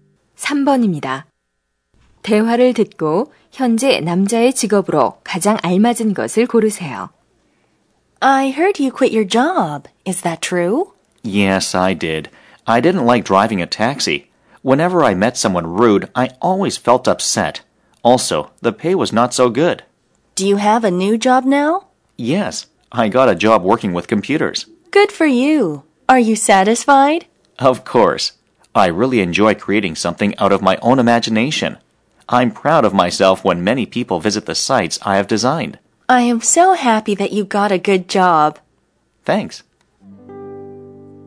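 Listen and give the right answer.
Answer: 웹 디자이너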